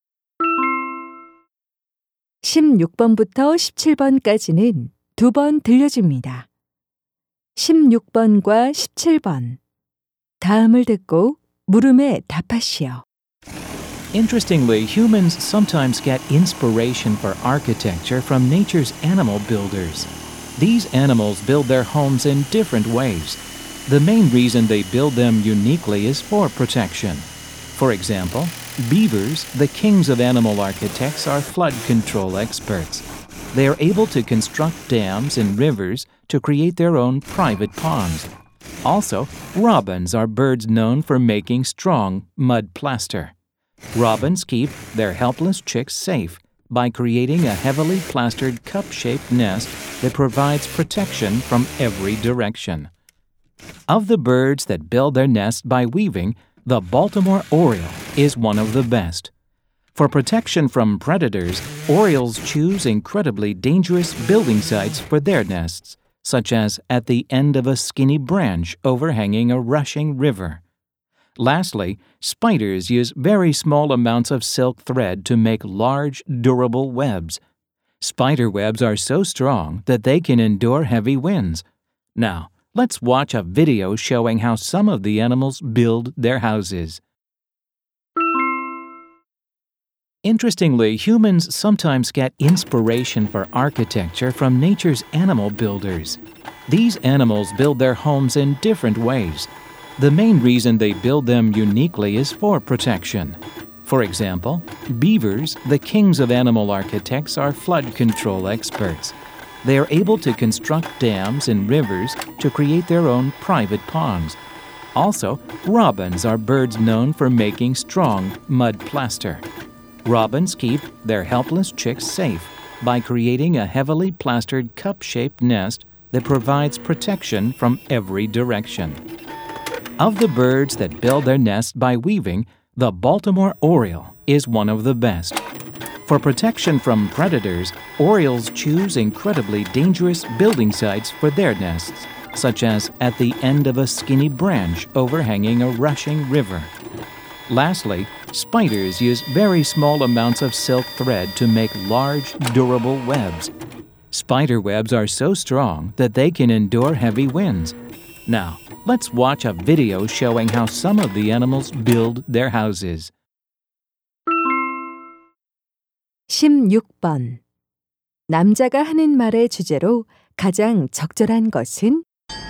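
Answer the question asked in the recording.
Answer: 동물들이 보호를 위해 집을 짓는 독특한 방법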